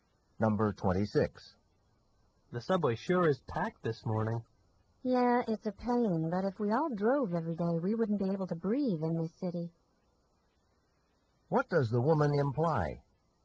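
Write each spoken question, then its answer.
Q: What does the woman imply?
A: Taking the subway reduces air pollution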